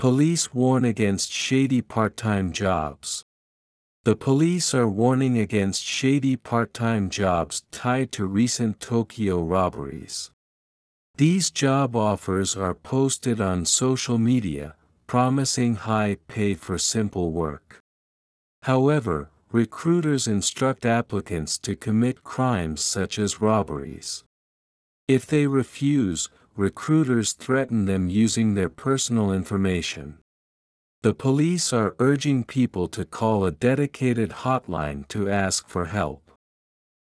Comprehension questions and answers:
次の各質問の答えを探しながら聞きましょう。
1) Who is warning people about shady part-time jobs?(誰が闇バイトの警告をしていますか。)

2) Where are these job offers posted?(これらの求人情報はどこに投稿されますか。)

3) What do recruiters instruct applicants?(指南役は応募者に何を指示しますか。)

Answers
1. The police are.
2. They are posted on social media.
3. They instruct them to commit crimes such as robberies.

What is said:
Police Warn Against Shady Part-Time Jobs
The police are warning against shady part-time jobs tied to recent Tokyo robberies.
These job offers are posted on social media, promising high pay for simple work.
However, recruiters instruct applicants to commit crimes such as robberies.
If they refuse, recruiters threaten them using their personal information.
The police are urging people to call a dedicated hotline to ask for help.